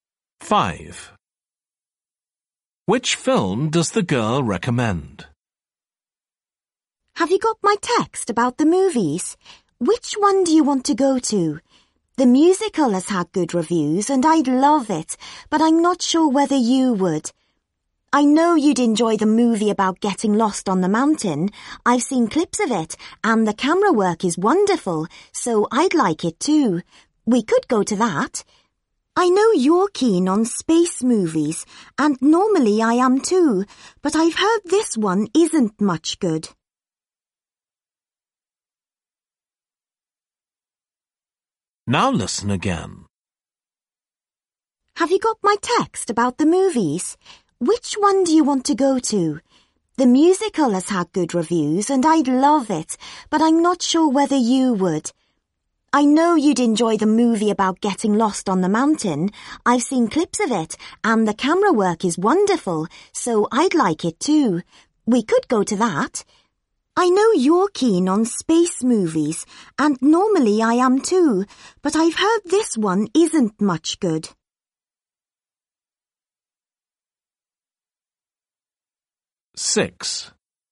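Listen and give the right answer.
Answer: The movie about getting lost on the mountain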